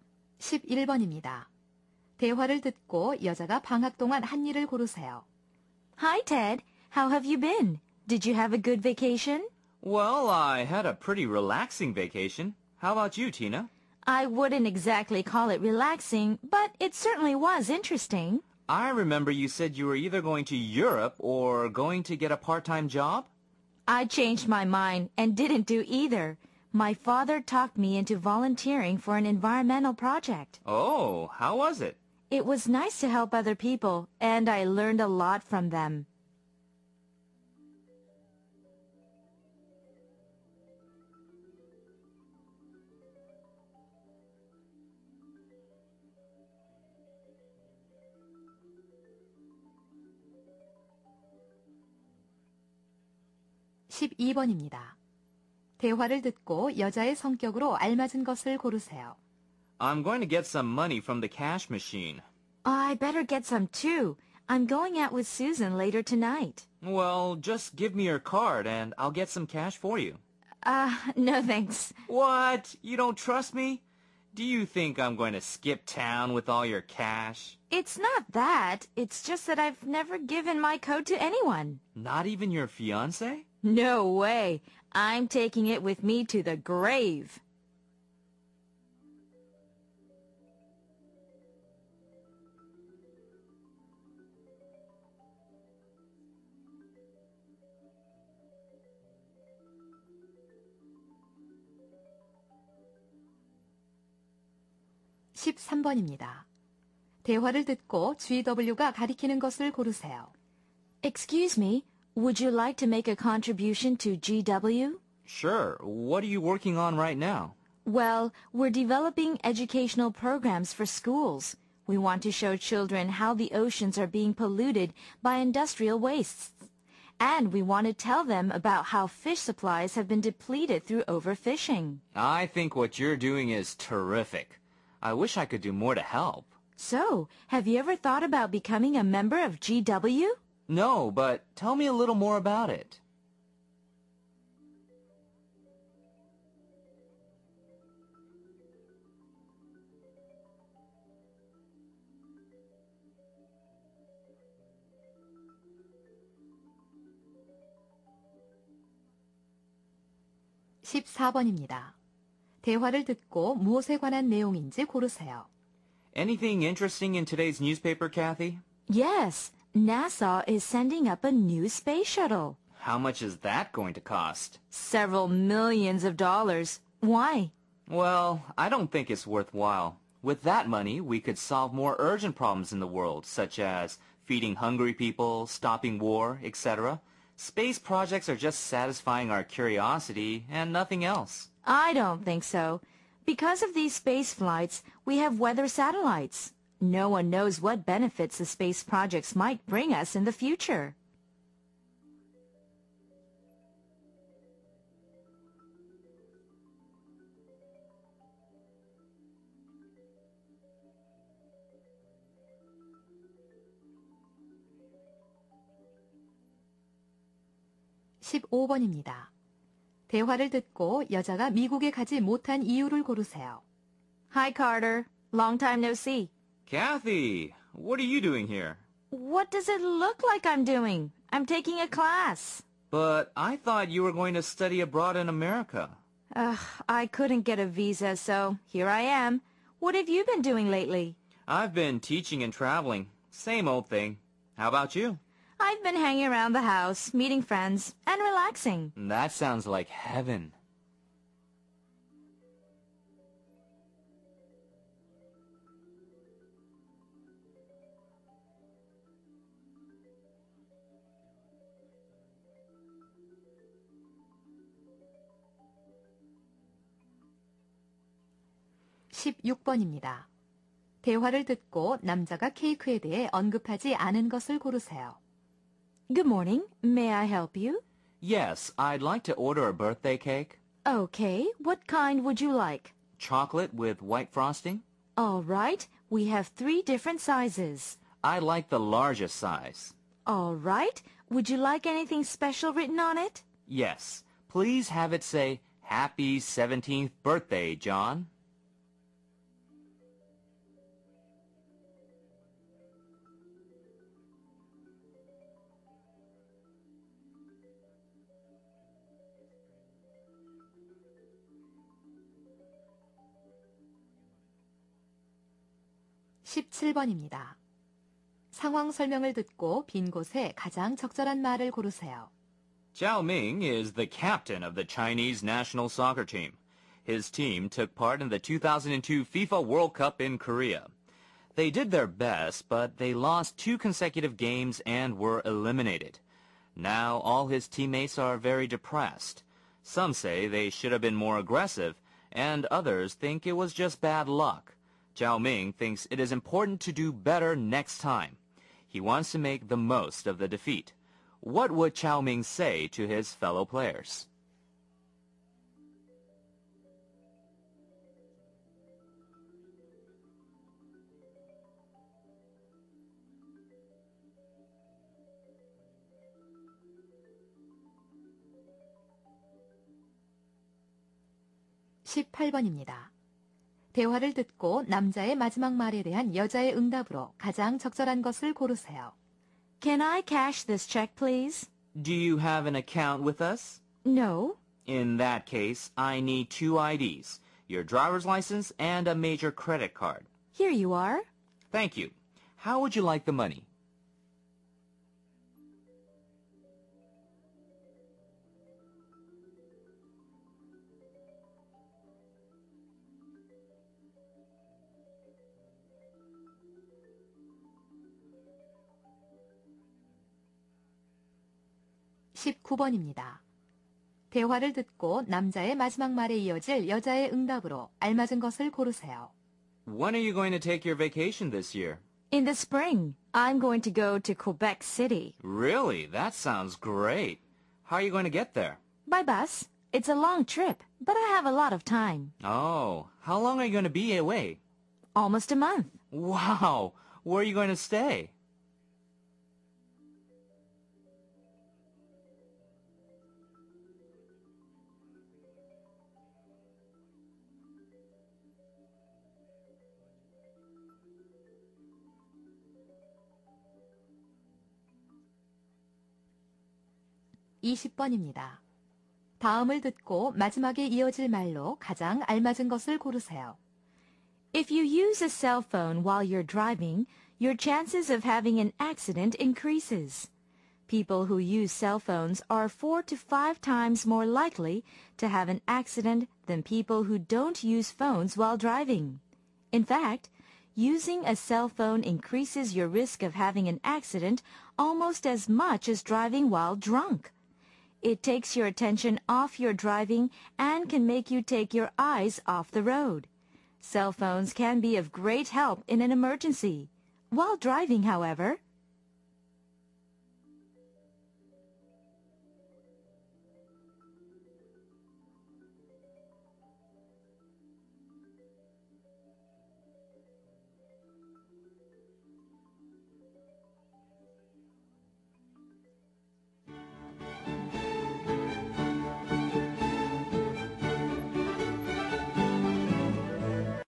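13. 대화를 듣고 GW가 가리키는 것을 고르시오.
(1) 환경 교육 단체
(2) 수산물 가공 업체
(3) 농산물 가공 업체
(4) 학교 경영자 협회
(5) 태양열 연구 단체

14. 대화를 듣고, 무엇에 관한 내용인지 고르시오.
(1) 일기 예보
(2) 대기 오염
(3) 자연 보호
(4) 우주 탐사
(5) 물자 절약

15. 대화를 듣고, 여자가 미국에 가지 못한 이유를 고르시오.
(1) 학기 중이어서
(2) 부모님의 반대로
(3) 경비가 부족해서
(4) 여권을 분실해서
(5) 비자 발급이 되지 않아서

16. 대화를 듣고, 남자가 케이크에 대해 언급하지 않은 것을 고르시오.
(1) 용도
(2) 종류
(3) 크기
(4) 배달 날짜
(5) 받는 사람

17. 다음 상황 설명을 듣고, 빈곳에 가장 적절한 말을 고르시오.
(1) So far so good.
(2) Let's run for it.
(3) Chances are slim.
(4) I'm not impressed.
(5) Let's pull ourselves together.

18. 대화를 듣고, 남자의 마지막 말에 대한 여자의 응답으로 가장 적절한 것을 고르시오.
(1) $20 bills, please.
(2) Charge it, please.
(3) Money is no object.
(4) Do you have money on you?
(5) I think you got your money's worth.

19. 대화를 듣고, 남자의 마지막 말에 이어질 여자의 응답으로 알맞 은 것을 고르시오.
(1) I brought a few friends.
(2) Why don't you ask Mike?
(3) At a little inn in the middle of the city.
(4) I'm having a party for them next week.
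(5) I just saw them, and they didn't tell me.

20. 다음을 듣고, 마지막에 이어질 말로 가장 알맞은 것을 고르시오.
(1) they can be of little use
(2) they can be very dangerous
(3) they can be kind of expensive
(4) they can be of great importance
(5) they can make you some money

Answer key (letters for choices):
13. 1
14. 4
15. 5
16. 4
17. 5
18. 1
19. 3
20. 2

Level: 3학년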